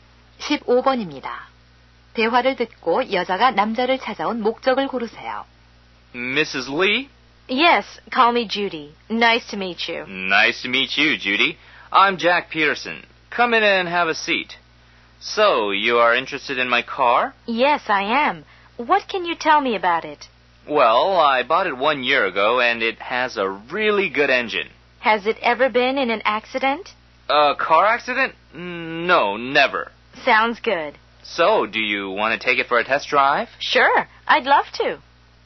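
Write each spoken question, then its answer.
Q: 대화를 듣고 여자가 남자를 찾아온 목적을 고르세요.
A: 남자의 차를 사려고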